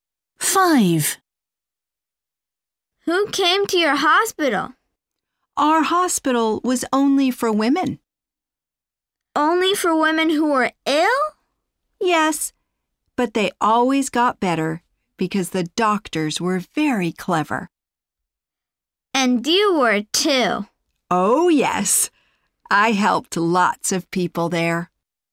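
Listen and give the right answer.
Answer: women who were ill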